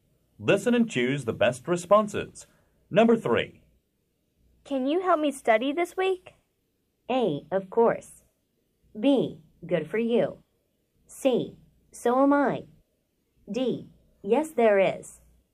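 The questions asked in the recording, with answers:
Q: Can you help me study this week?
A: A: Of course.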